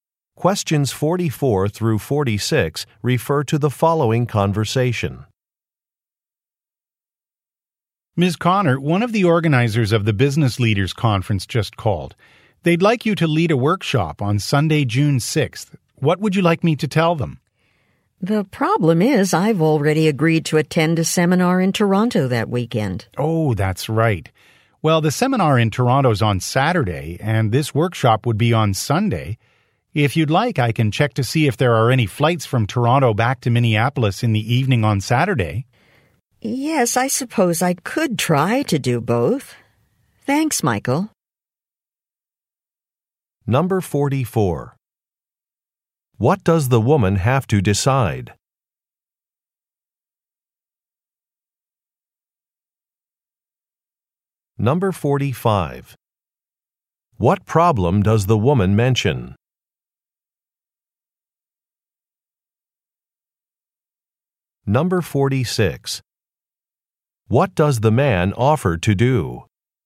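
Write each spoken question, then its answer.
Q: What does the woman have to decide?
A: Whether to lead a workshop at the Business Leaders Conference

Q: What problem does the woman mention?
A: She already agreed to attend a seminar in Toronto that weekend

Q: What does the man offer to do?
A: Check for Saturday evening flights from Toronto to Minneapolis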